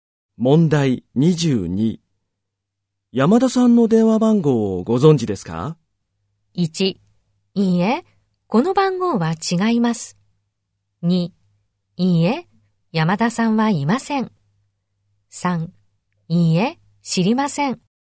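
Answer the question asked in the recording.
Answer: 3: いいえ、知りません。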